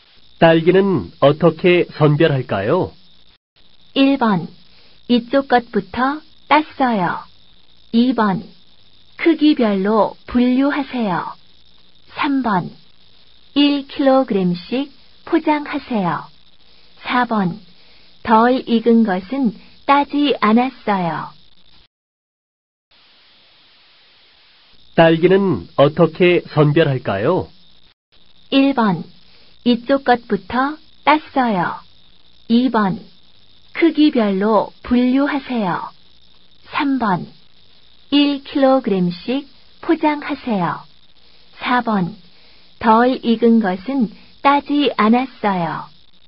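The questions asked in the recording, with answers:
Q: 딸기는 어떻게 선별할까요?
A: 2: 크기별로 분류하세요.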